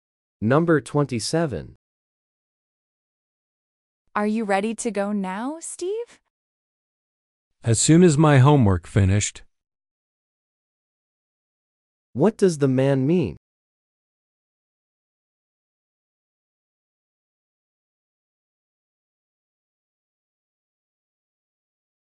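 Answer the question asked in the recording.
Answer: He will be ready as soon as his homework is finished.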